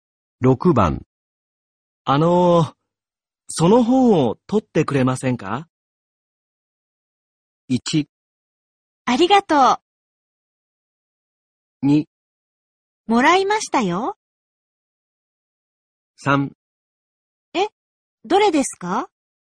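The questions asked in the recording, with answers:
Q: その本を取ってくれませんか?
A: 3: え、どれですか?

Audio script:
1
ありがとう。
2
もらいましたよ。
3
え、どれですか。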